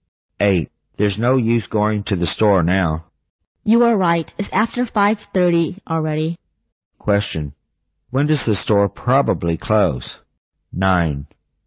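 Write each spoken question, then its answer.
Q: When does the store probably close?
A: At 5:30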